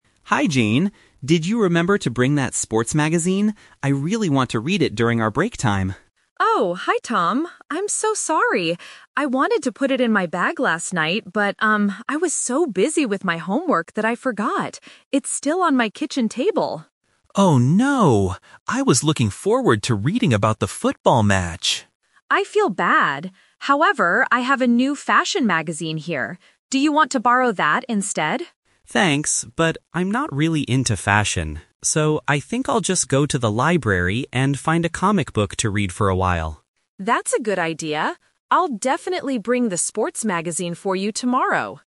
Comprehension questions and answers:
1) What did Tom want to borrow from Jane?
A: A sports magazine

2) Why didn't Jane bring the magazine today?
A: She was too busy with homework.

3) What will Tom do during the break?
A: Go to the library.

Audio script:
Tom: Hi, Jane! Did you remember to bring that sports magazine? I really want to read it during our break time.
Jane: Oh, hi Tom. I'm so sorry! I wanted to put it in my bag last night, but, um, I was so busy with my homework that I forgot. It's still on my kitchen table.
Tom: Oh no! I was looking forward to reading about the football match.
Jane: I feel bad. However, I have a new fashion magazine here. Do you want to borrow that instead?
Tom: Thanks, but I'm not really into fashion. So, I think I'll just go to the library and find a comic book to read for a while.